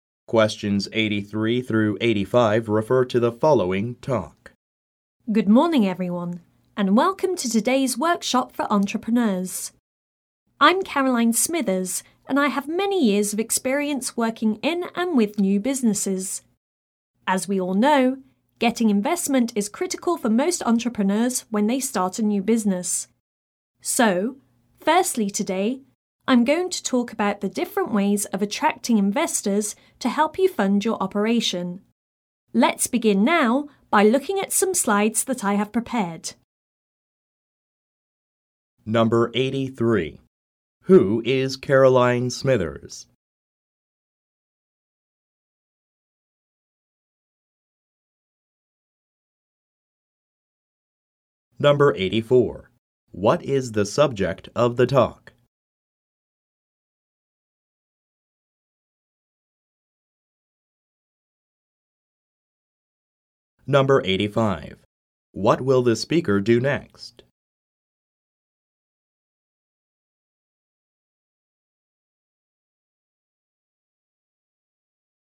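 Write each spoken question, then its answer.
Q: Who is Caroline Smithers?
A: An experienced workshop leader for entrepreneurs who has worked in and with new businesses

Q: What is the subject of the talk?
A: Ways of attracting investors to fund a new business

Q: What will the speaker do next?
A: Show some slides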